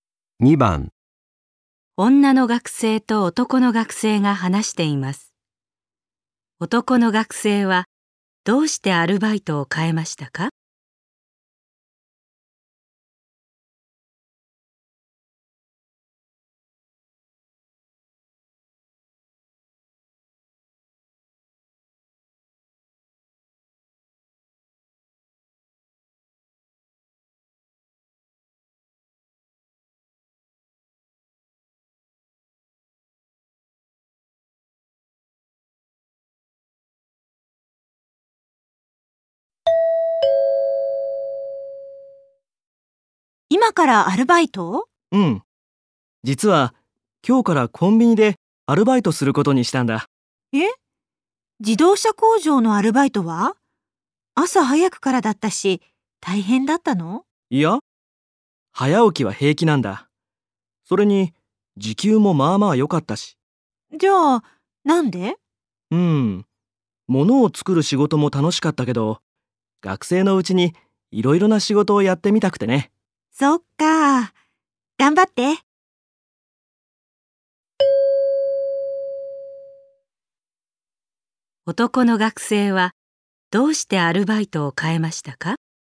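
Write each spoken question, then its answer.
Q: 男の学生はどうしてアルバイトを変えましたか?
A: 学生のうちにいろいろな仕事をやってみたいから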